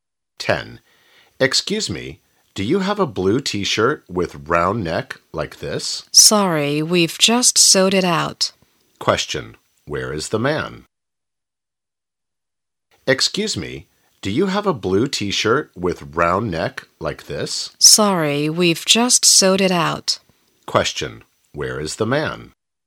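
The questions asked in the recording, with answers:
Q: Where is the man?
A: In a clothes shop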